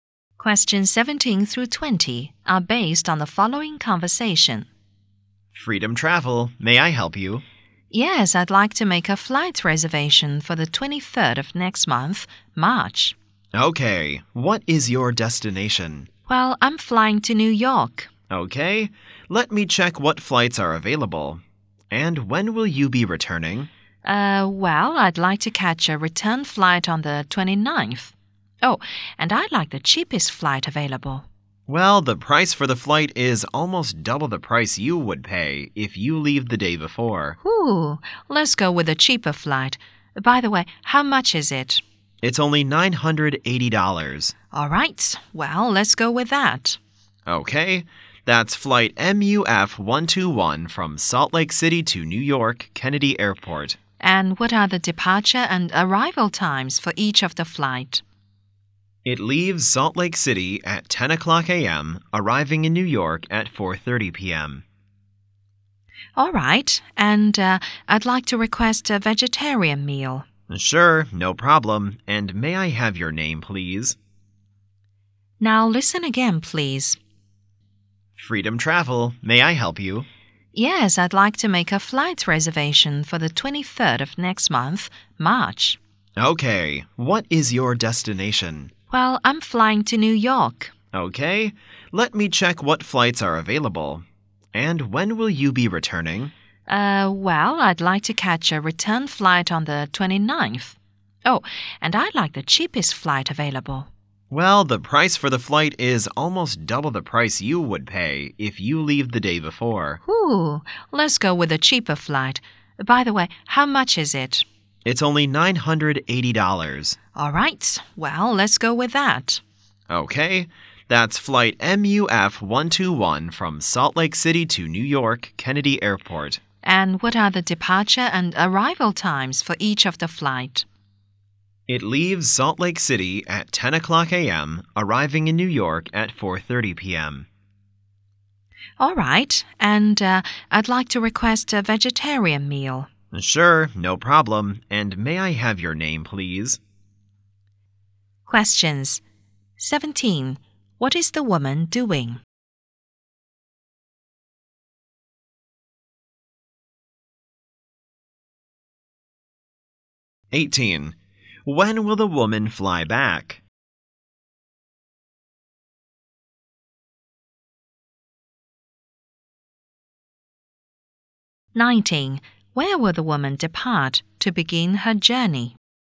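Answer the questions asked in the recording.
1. Making a flight reservation
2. On the 29th of March
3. Salt Lake City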